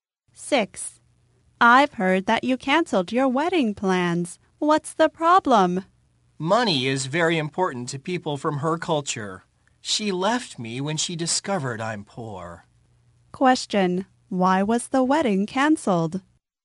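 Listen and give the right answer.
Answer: She left when she discovered he is poor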